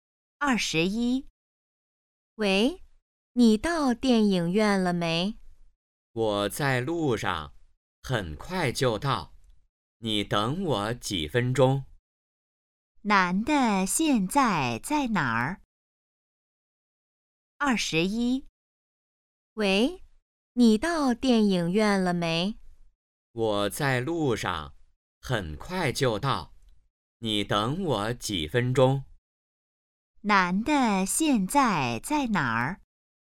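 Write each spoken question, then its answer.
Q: 男的现在在哪儿?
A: 在路上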